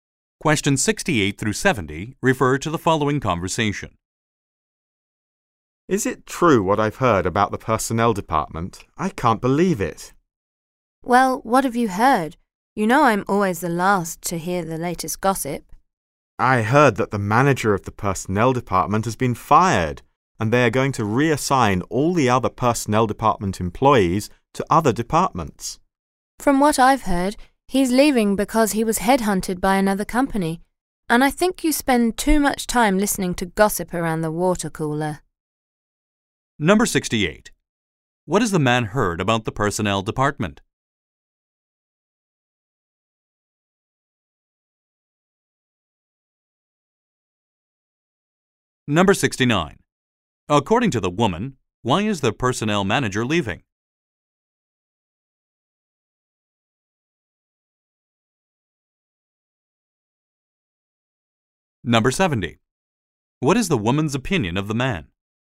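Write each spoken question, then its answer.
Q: What has the man heard about the personnel department?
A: The manager was fired and the staff will be reassigned

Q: According to the woman, why is the personnel manager leaving?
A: He was headhunted by another company

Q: What is the woman's opinion of the man?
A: He spends too much time listening to gossip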